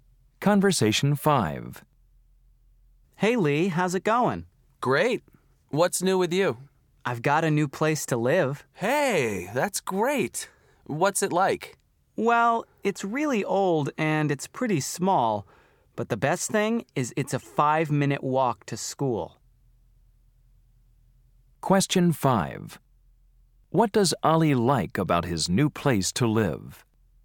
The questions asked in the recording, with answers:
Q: What does Ali like about his new place to live?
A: Wow, you're really close to school.